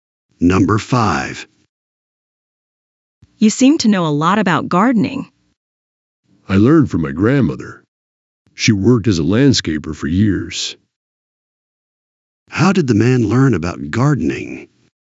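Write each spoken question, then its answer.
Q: How did the man learn about gardening?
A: From his grandmother, who was a landscaper.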